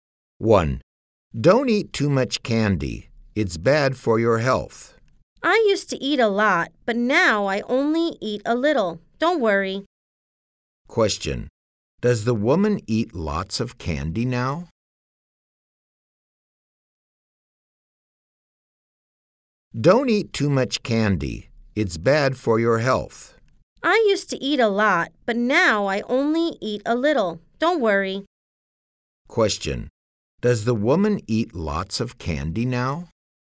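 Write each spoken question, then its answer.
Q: Question, does the woman eat lots of candy now?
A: No, she only eats a little now.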